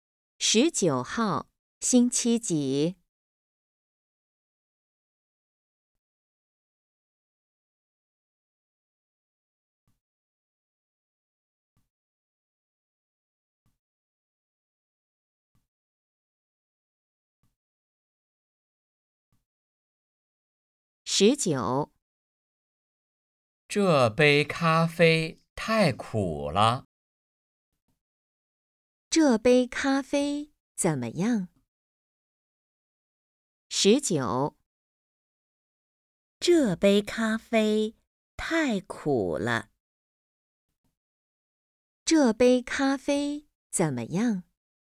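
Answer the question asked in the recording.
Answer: 太苦了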